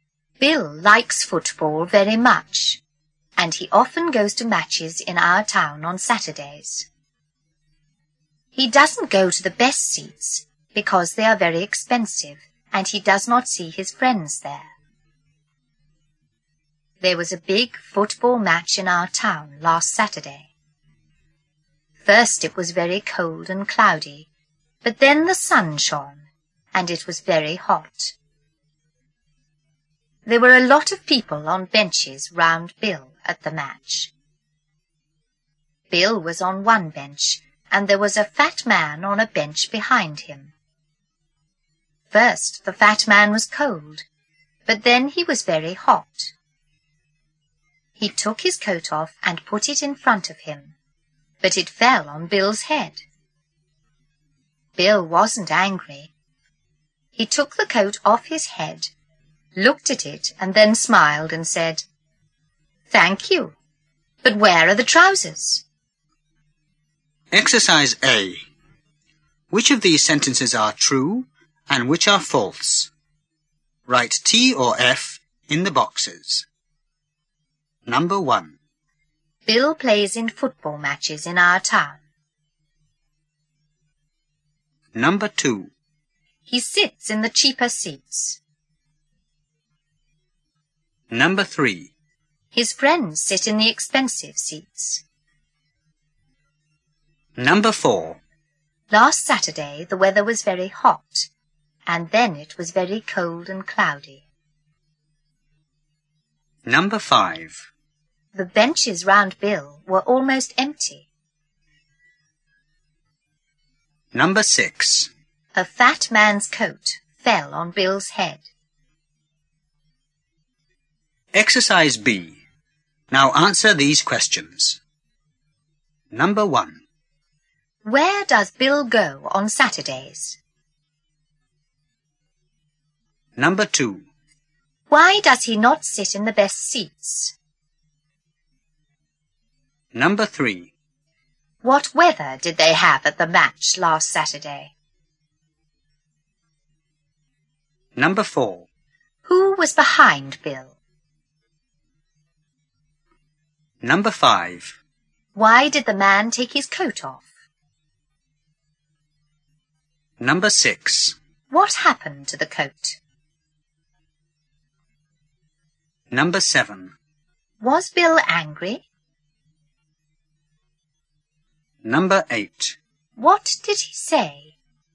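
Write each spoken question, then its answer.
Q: Bill plays in football matches in our town.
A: False

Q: He sits in the cheaper seats.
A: True

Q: Last Saturday the weather was very hot, and then it was very cold and cloudy.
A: False

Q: The benches round Bill were almost empty.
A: False

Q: A fat man's coat fell on Bill's head.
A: True

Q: Where does Bill go on Saturdays?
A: To football matches in the town

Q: Why does he not sit in the best seats?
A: Because they are very expensive

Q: What weather did they have at the match last Saturday?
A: First cold and cloudy, then sunny and very hot

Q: Who was behind Bill?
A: A fat man

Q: Why did the man take his coat off?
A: Because he was very hot

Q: What happened to the coat?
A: It fell on Bill's head

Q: Was Bill angry?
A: No

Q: What did he say?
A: Thank you, but where are the trousers?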